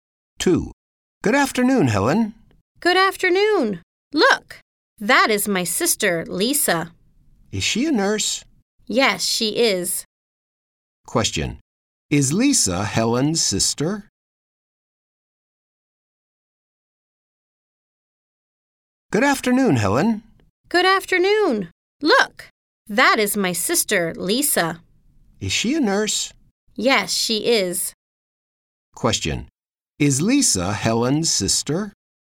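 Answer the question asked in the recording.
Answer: Yes, she is.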